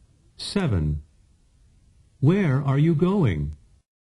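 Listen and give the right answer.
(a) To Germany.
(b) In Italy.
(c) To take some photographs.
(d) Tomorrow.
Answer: (a) To Germany.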